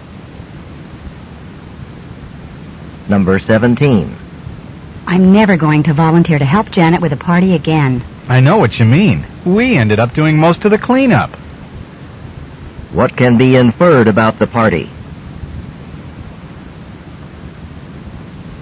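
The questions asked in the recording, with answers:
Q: What can be inferred about the party?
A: The speakers had to do most of the cleanup.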